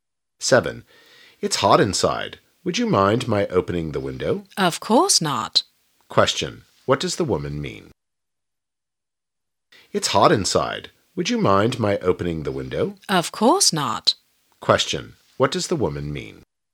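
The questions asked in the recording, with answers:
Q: What does the woman mean?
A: She doesn't mind; he can open the window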